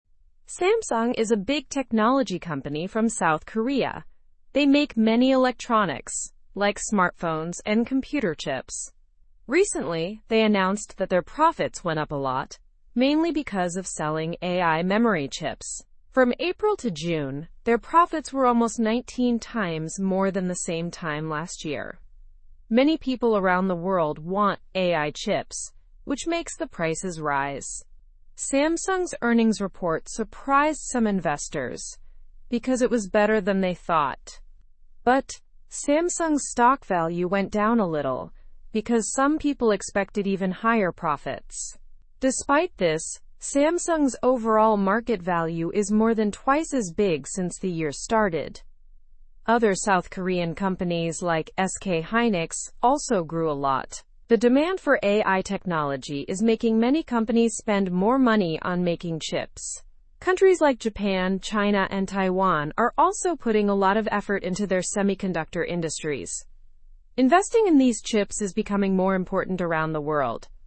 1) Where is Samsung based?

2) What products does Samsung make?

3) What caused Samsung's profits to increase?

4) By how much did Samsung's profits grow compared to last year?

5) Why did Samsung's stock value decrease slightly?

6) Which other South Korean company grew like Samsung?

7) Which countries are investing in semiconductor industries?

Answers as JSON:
{"1": "South Korea.", "2": "Smartphones and computer chips.", "3": "Sales of AI memory chips.", "4": "Almost 19 times more.", "5": "Some people thought profits would be even higher.", "6": "SK Hynix.", "7": "Japan, China, and Taiwan."}

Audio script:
Samsung is a big technology company from South Korea. They make many electronics, like smartphones and computer chips. Recently, they announced that their profits went up a lot, mainly because of selling AI memory chips. From April to June, their profits were almost 19 times more than the same time last year.
Many people around the world want AI chips, which makes the prices rise. Samsung's earnings report surprised some investors because it was better than they thought. But, Samsung's stock value went down a little because some people expected even higher profits. Despite this, Samsung's overall market value is more than twice as big since the year started.
Other South Korean companies like SK Hynix also grew a lot. The demand for AI technology is making many companies spend more money on making chips. Countries like Japan, China, and Taiwan are also putting a lot of effort into their semiconductor industries. Investing in these chips is becoming more important around the world.

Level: Level 2